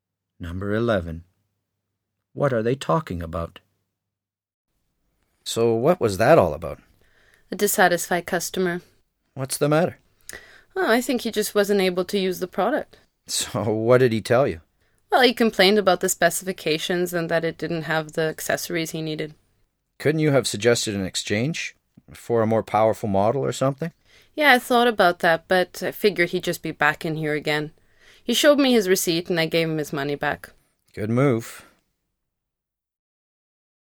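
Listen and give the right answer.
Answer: A customer who returned a product for a refund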